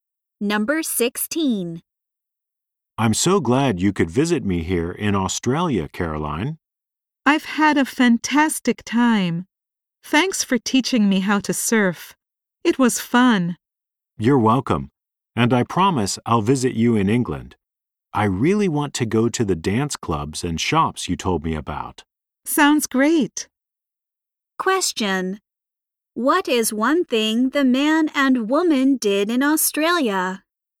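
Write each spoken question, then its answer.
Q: What is one thing the man and woman did in Australia?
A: They went surfing.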